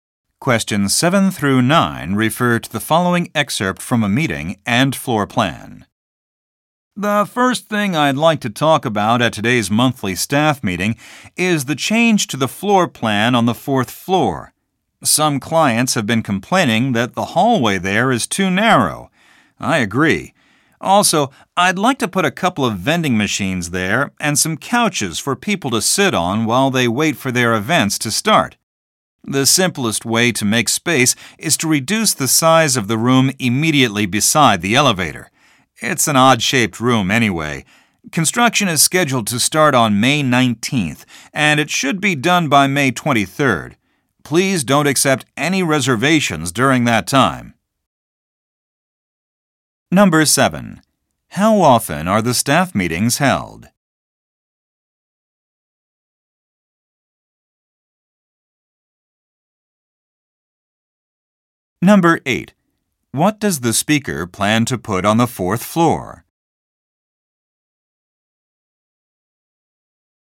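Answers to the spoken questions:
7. Monthly
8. Vending machines and couches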